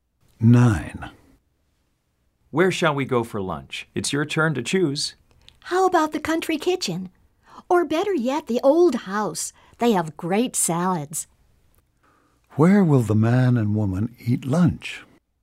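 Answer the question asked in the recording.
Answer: The Old House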